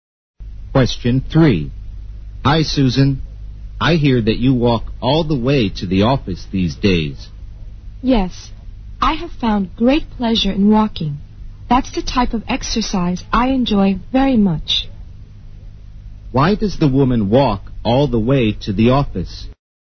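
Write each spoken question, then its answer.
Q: Why does the woman walk all the way to the office?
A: She enjoys walking as exercise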